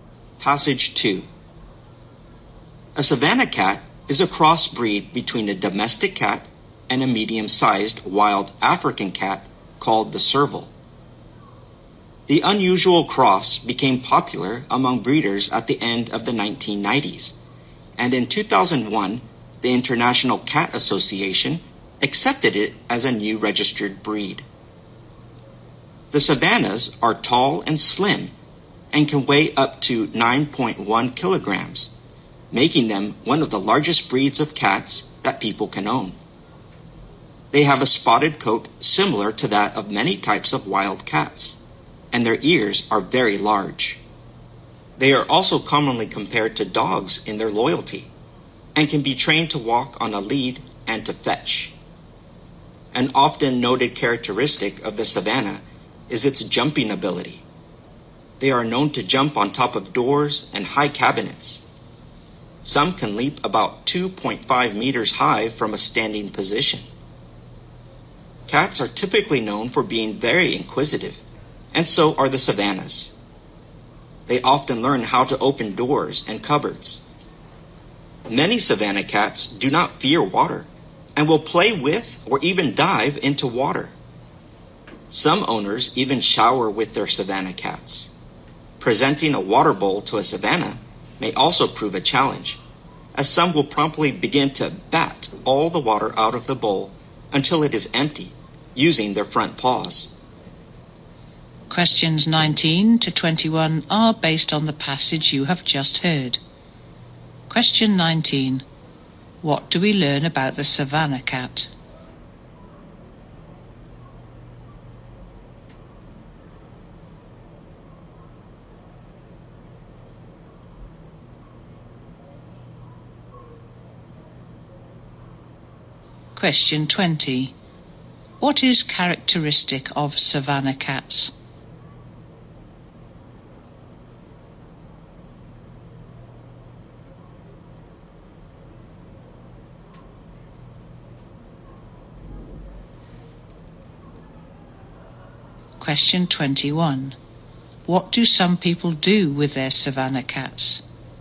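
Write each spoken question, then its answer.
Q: What is characteristic of savannah cats?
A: Their jumping ability

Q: What do some people do with their savannah cats?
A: They shower with them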